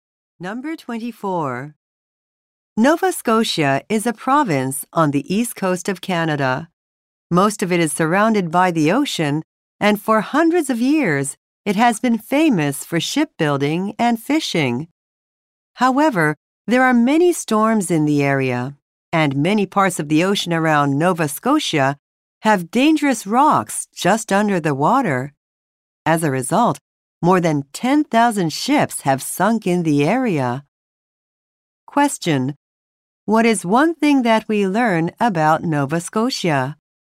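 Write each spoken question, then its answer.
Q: What is one thing that we learn about Nova Scotia?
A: More than 10,000 ships have sunk in the area.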